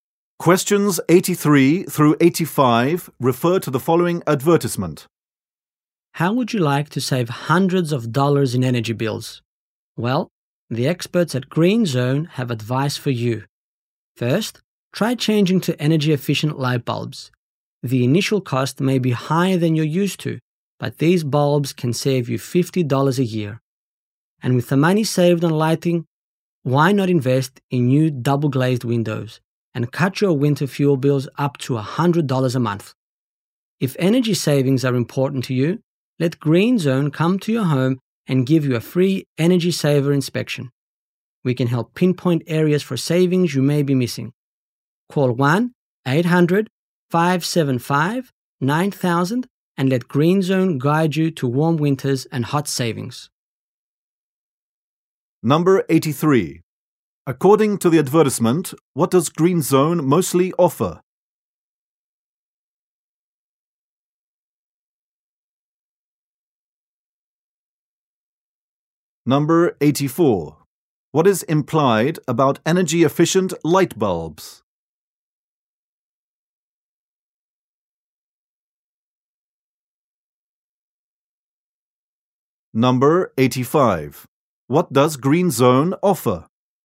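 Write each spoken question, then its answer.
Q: According to the advertisement, what does Green Zone mostly offer?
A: Advice on saving energy

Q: What is implied about energy-efficient light bulbs?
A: They cost more at first but save money over time.

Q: What does Green Zone offer?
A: A free energy saver inspection in your home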